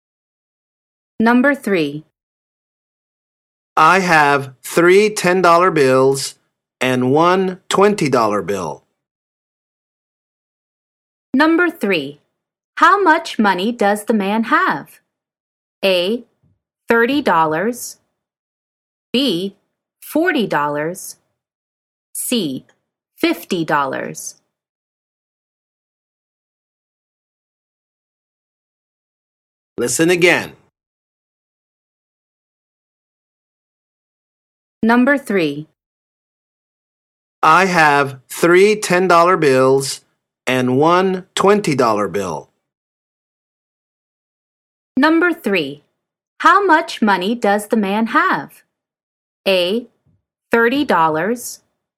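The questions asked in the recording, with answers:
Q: How much money does the man have?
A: C: $50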